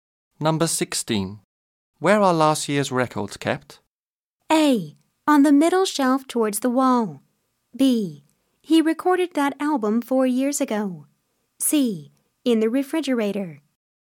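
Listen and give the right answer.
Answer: A: On the middle shelf towards the wall.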